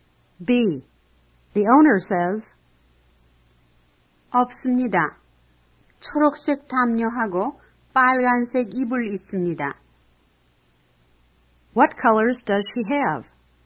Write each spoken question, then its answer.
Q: What colors does she have?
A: She has green and red.